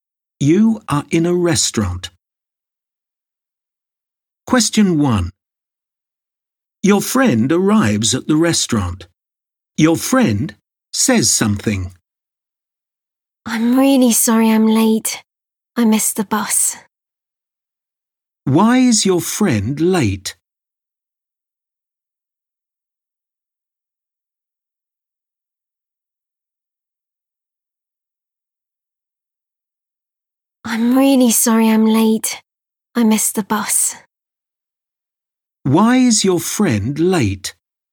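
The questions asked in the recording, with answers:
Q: Why is your friend late?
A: Missed the bus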